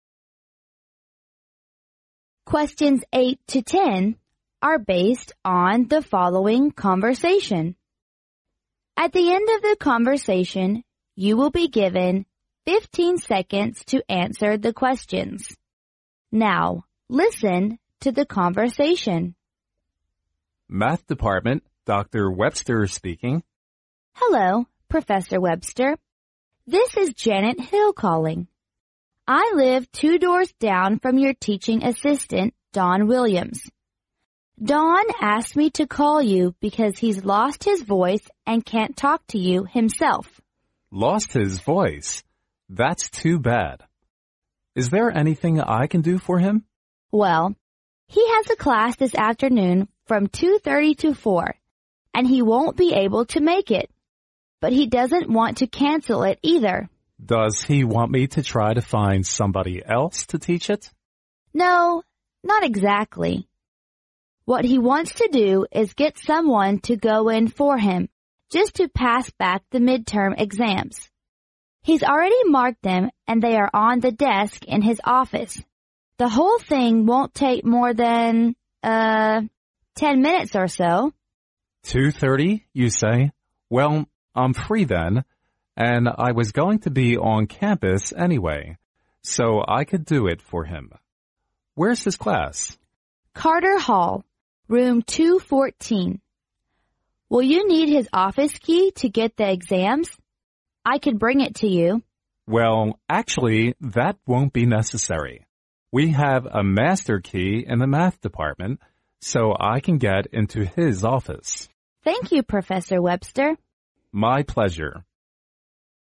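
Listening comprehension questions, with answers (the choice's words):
Now, listen to the conversation.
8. Why can't Don call the professor himself?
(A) Because he is in the hospital.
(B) Because he has a bad cough.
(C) Because he has a busy line.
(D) Because he lost his voice.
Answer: Because he lost his voice.

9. What does the professor's assistant want him to do?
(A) To cancel the class.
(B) To give the midterm exams.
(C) To let someone pass back the exam papers.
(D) To find someone to teach the class.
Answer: To let someone pass back the exam papers.

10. How can the professor unlock the office's door?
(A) By using the key from the department's master.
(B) By using the key from the superintendent.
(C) By using the key from the woman.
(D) By using the key from his assistant.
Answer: By using the key from the department's master.

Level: 英语四级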